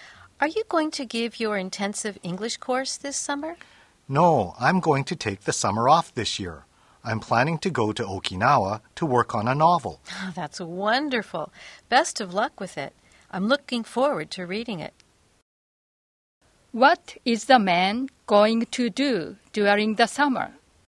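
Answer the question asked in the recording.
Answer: Go to Okinawa to work on a novel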